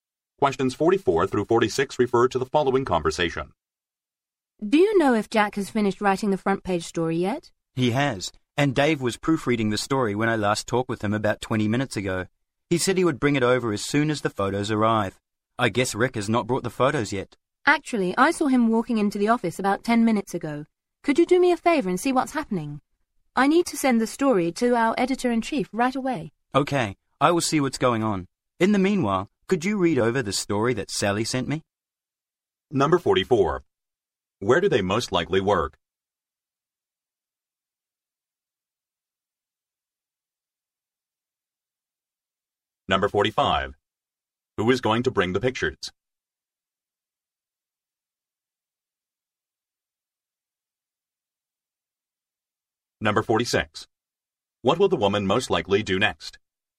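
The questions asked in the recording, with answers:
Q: Where do they most likely work?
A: At a newspaper

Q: Who is going to bring the pictures?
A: Rick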